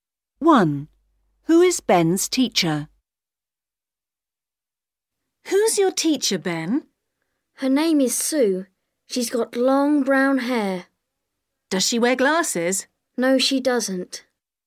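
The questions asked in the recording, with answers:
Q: Who is Ben's teacher?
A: Sue, who has long brown hair and no glasses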